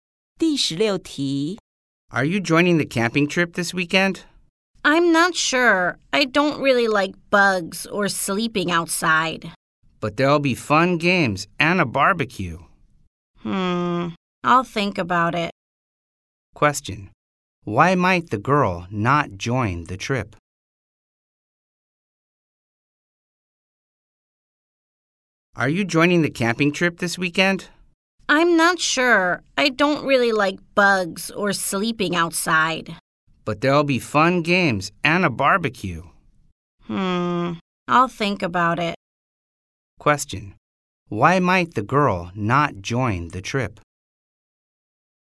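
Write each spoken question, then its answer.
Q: Why might the girl not join the trip?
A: She doesn't like bugs or sleeping outside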